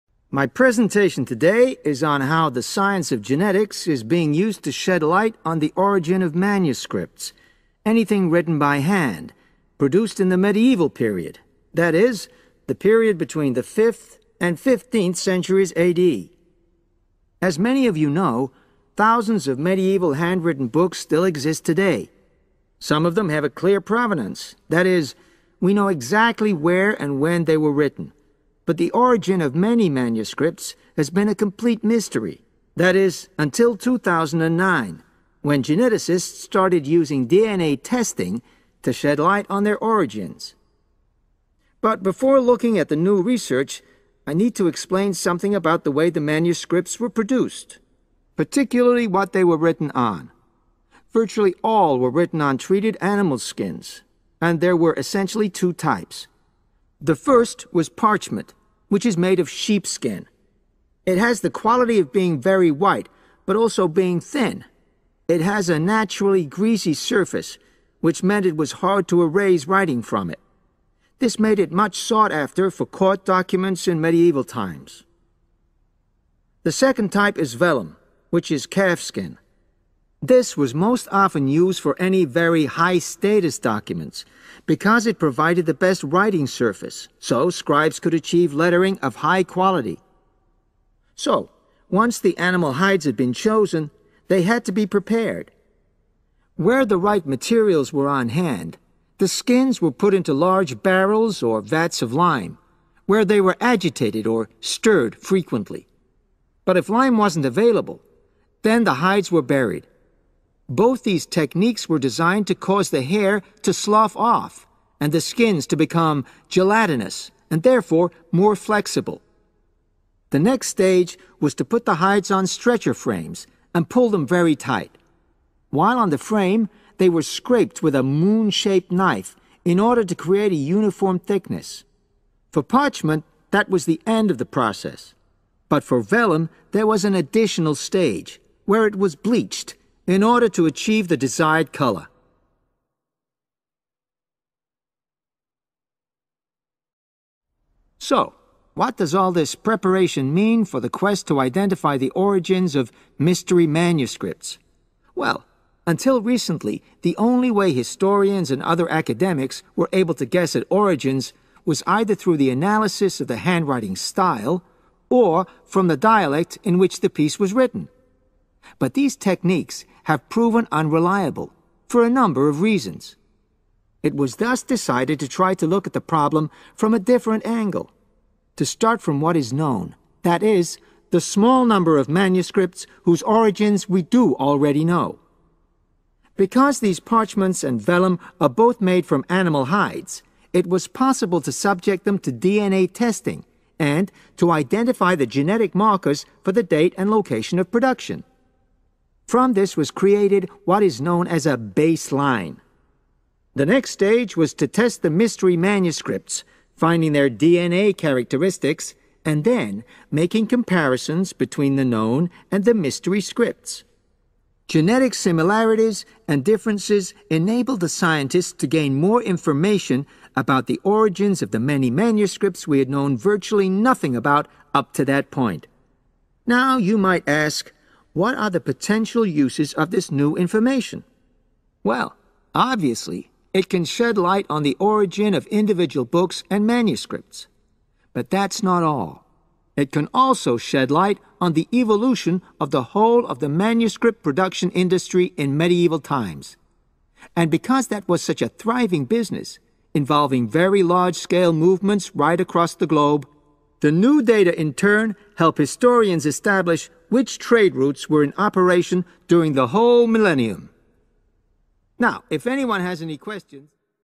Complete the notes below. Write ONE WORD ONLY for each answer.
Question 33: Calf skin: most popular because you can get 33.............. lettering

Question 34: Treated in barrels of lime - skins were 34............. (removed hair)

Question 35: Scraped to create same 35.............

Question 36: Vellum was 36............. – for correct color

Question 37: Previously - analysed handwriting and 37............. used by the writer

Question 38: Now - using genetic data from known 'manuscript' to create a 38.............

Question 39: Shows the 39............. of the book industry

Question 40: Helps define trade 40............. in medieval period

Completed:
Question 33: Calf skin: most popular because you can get high-quality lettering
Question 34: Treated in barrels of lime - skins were buried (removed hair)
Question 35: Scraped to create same thickness
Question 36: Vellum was bleached/whitened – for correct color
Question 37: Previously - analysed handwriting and dialect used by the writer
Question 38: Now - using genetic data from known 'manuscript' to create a baseline
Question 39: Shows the evolution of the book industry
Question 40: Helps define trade routes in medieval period